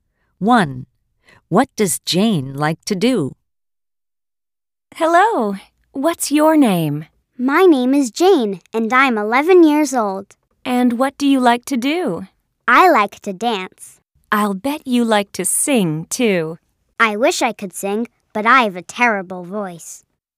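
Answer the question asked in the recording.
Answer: dance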